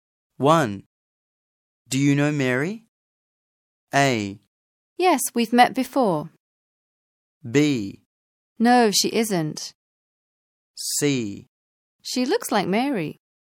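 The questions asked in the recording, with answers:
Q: Do you know Mary?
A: A: Yes, we've met before.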